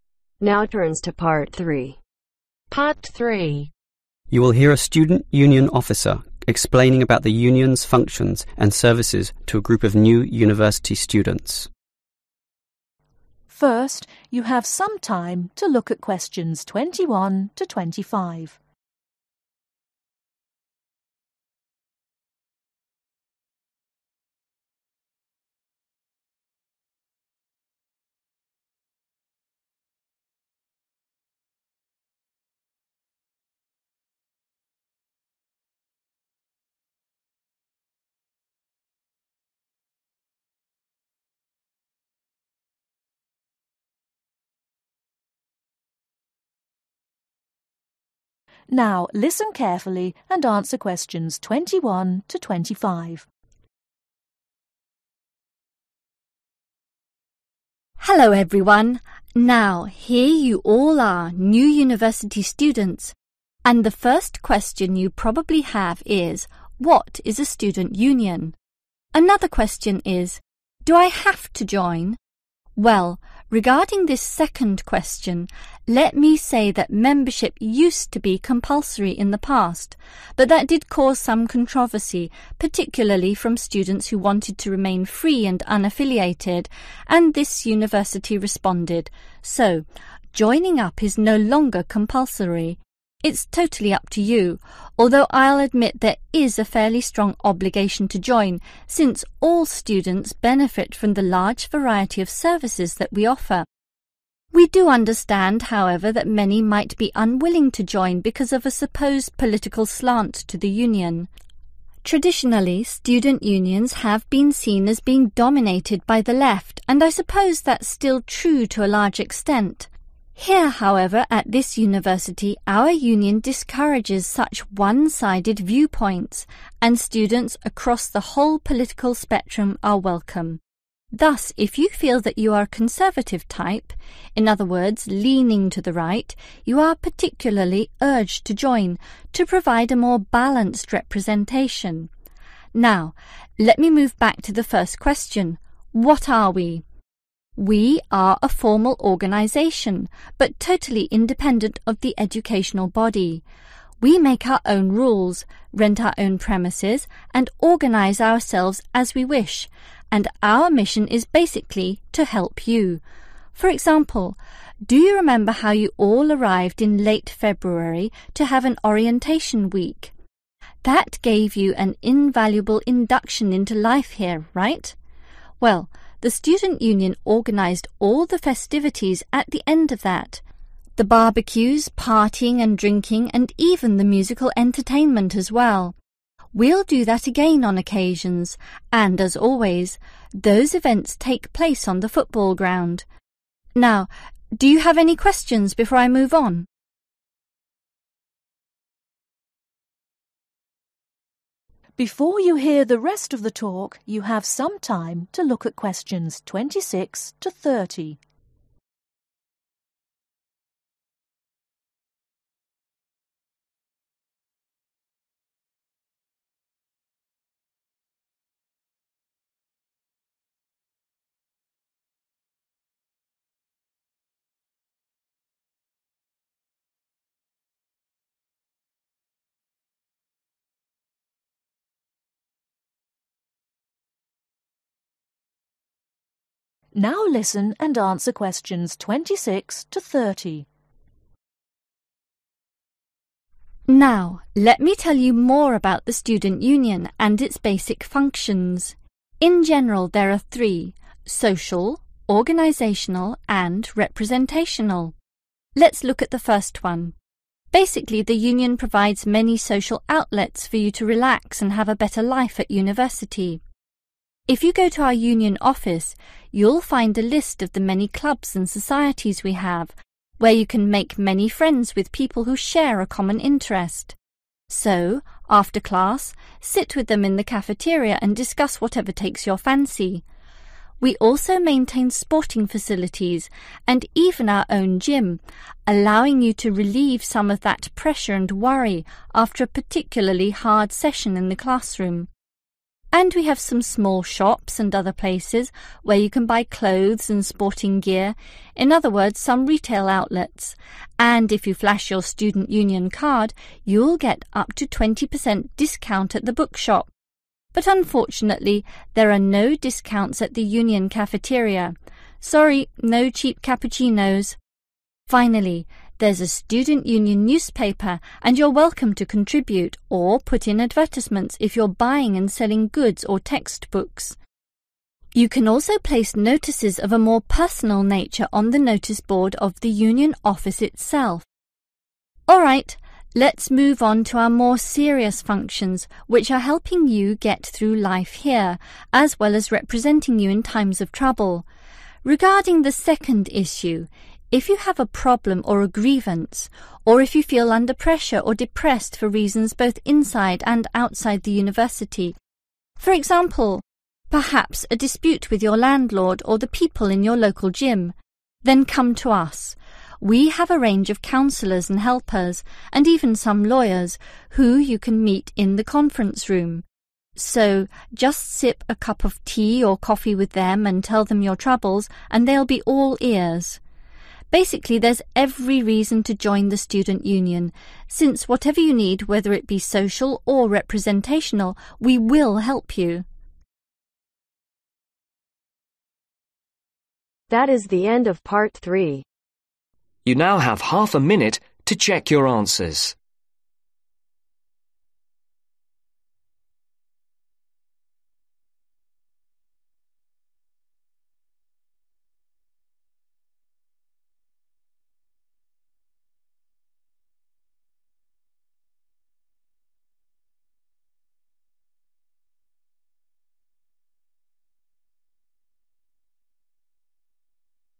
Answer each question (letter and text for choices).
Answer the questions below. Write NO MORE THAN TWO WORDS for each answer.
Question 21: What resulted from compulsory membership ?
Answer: Some controversy

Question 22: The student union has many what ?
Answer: services

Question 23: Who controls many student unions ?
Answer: the left

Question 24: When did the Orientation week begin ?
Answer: late February

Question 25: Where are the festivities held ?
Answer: football ground

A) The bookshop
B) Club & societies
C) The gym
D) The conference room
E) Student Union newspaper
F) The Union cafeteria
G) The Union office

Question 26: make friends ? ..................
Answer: B) Club & societies

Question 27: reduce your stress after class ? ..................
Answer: C) The gym

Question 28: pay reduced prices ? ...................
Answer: A) The bookshop

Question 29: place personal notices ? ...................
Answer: G) The Union office

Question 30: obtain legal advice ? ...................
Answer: D) The conference room